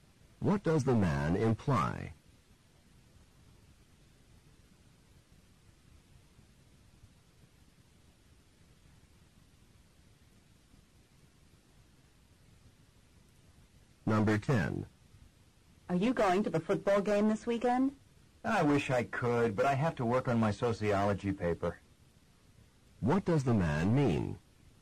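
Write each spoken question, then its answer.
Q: What does the man mean?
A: He cannot go because he must work on his paper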